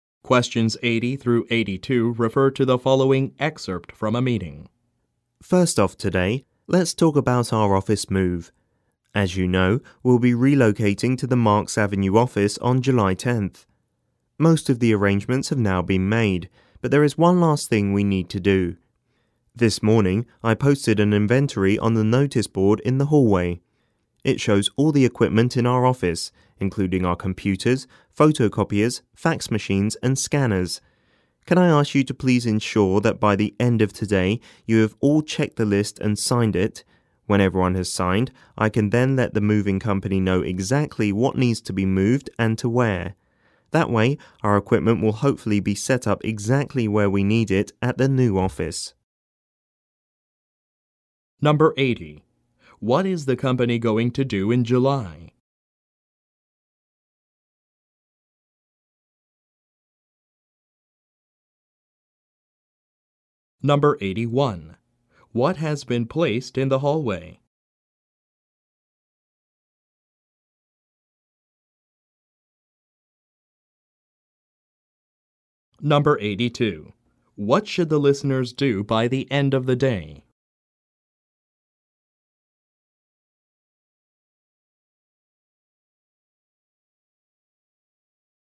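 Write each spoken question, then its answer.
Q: What is the company going to do in July?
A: Move to a new office on Marks Avenue

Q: What has been placed in the hallway?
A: An equipment inventory list

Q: What should the listeners do by the end of the day?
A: Check and sign the inventory list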